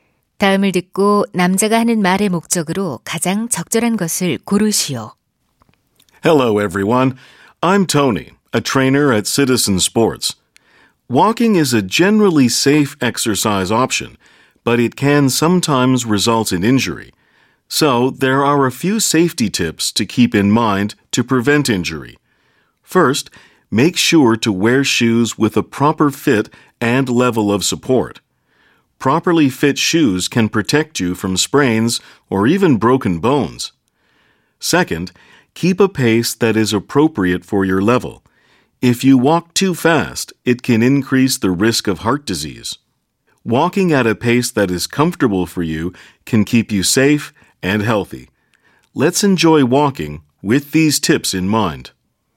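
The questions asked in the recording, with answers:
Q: 다음을 듣고 남자가 하는 말의 목적으로 가장 적절한 것을 고르시오.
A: 걷기 운동 시 부상 예방 안전 수칙을 알려 주려고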